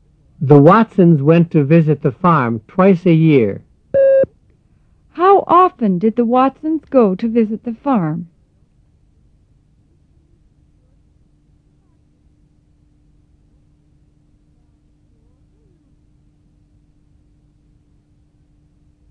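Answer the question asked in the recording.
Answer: Twice a year.

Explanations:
The Watsons went to visit the farm twice a year.

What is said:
The Watsons went to visit the farm twice a year. How often did the Watsons go to visit the farm?

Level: 入门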